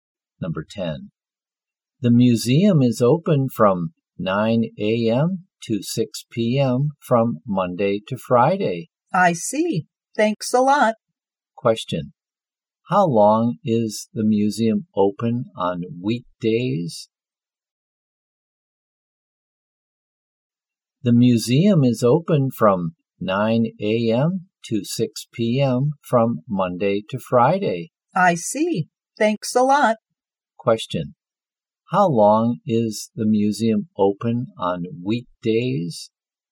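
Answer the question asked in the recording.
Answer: 9 hours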